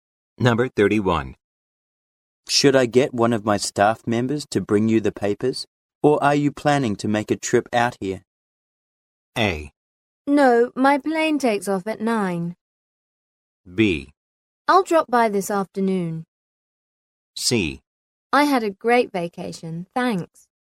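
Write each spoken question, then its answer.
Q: Should I get one of my staff members to bring you the papers, or are you planning to make a trip out here?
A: B: I'll drop by this afternoon.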